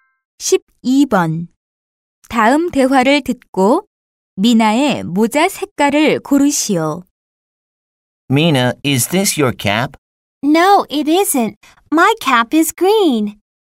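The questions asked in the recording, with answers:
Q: 다음 대화를 듣고 미나의 모자 색깔을 고르시오.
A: 초록색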